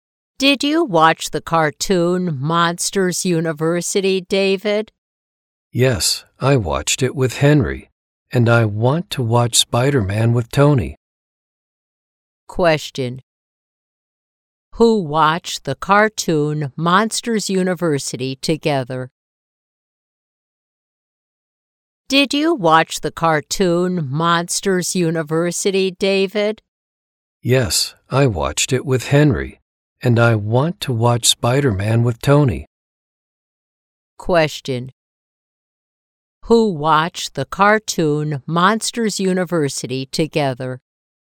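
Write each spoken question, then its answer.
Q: Who watched the cartoon Monsters University together?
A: David and Henry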